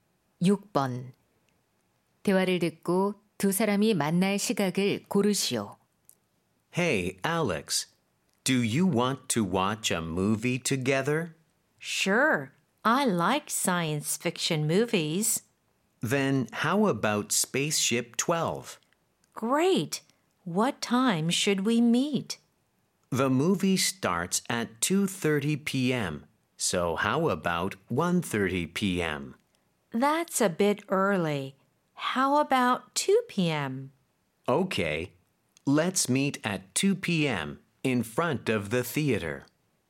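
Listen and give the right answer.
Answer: 오후 2시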